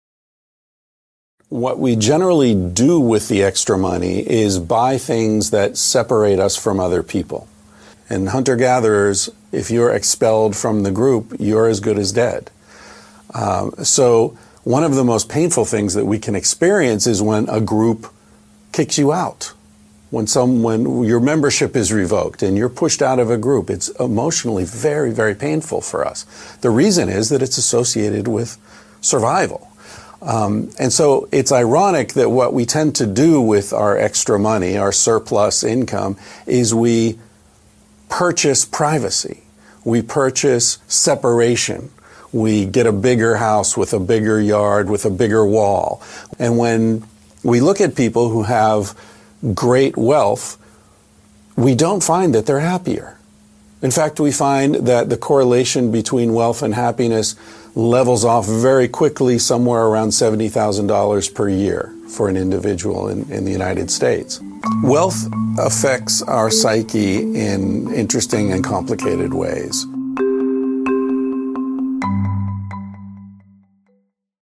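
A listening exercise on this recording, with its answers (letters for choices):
Read the questions carefully and choose the best alternative.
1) What is ironic about wealth? (3 p.)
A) It leads to a never-ending race with no real winners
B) People use it to buy something considered harmful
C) What people obtain with it is available for free as well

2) How does wealth affect the happiness of people who earn more than $70,000 annually in the US? (3 p.)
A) It is irrelevant to their happiness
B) It increases their happiness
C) It decreases their happiness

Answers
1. B
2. A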